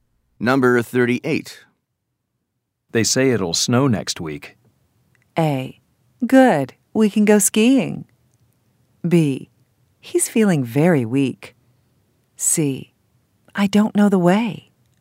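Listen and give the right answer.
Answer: A: Good. We can go skiing.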